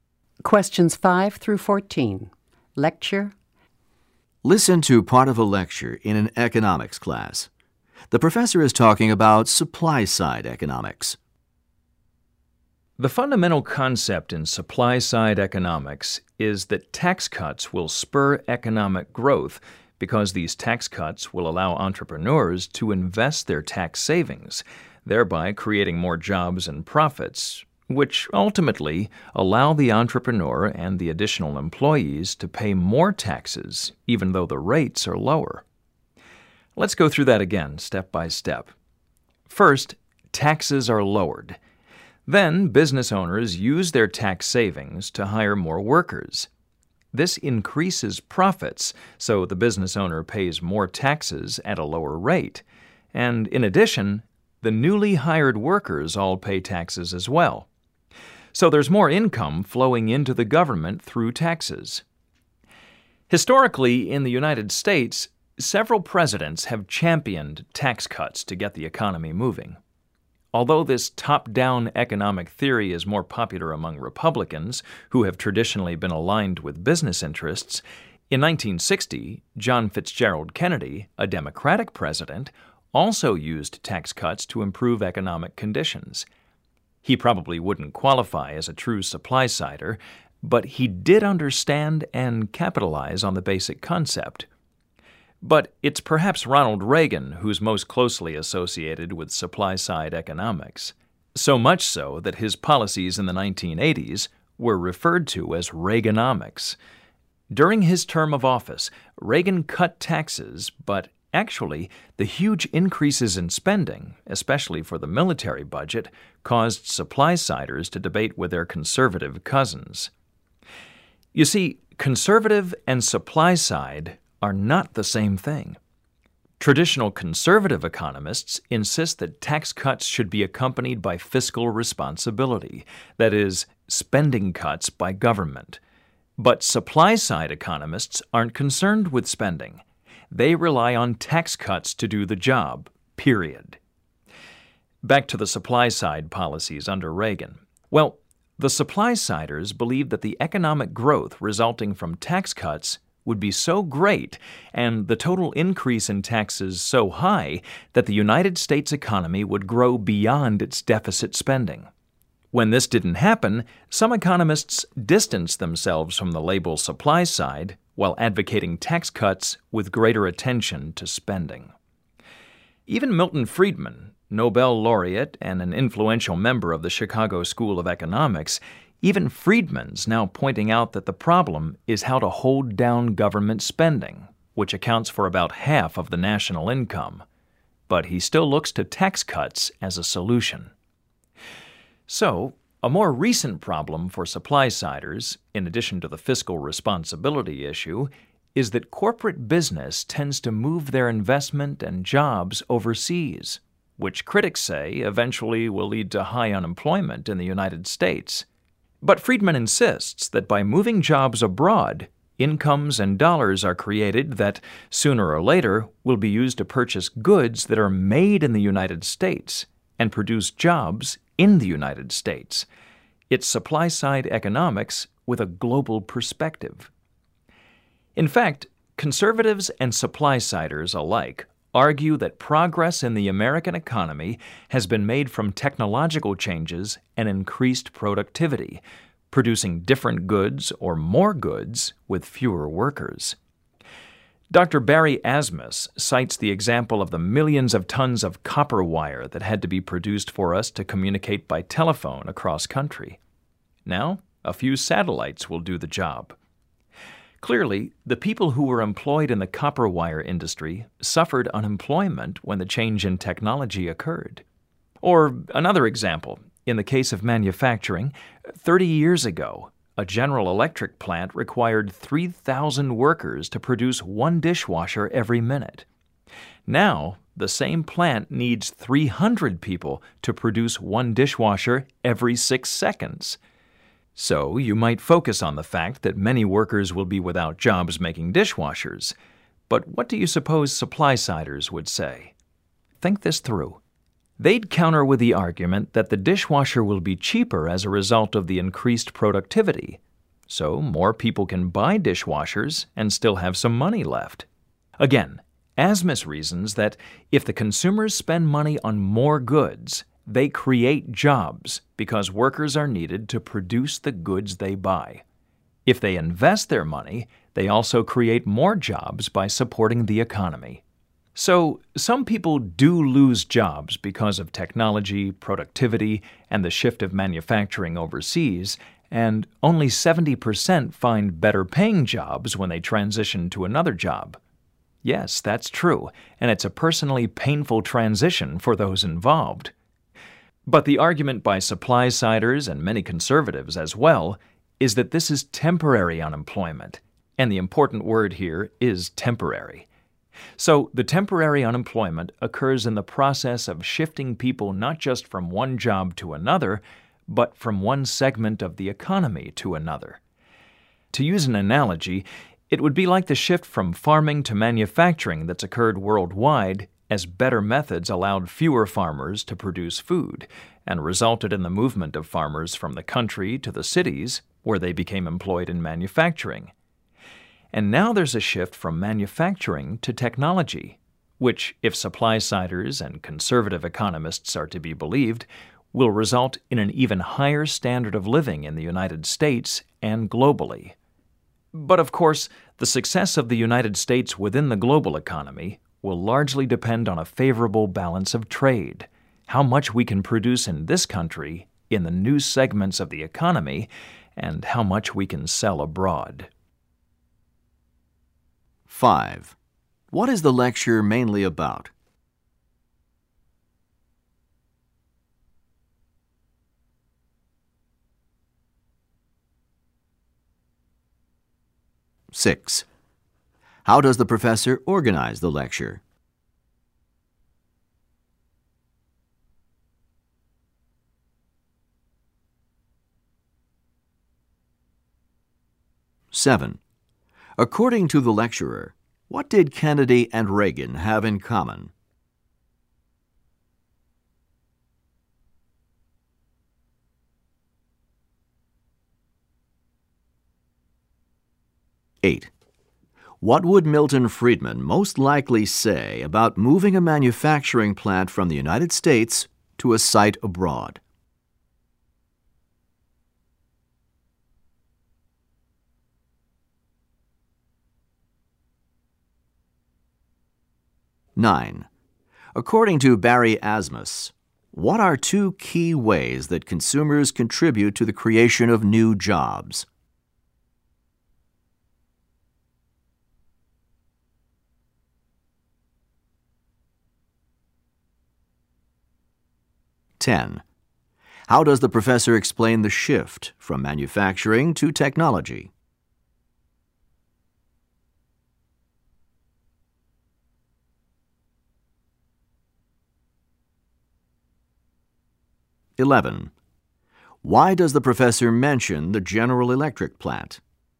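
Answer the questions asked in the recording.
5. Supply-side economics
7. Both used tax cuts to improve the economy
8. It creates incomes abroad that will eventually buy US goods and create US jobs
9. By spending money on more goods and by investing their money
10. By comparing it to the earlier shift from farming to manufacturing
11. As an example of technology increasing productivity with fewer workers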